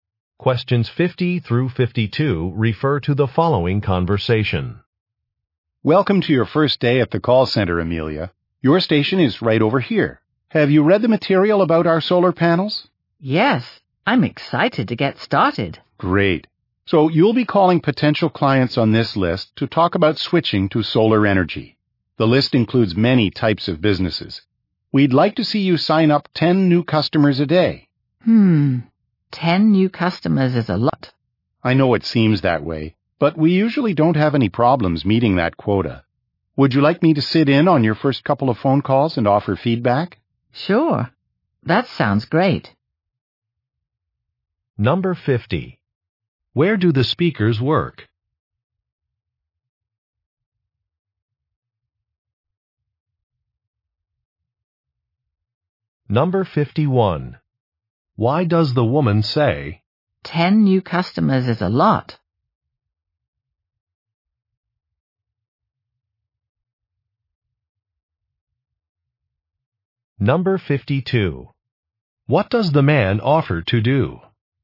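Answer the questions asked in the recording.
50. At a call center for a solar panel company
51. She is worried that the goal is too high
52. Sit in on her first calls and give feedback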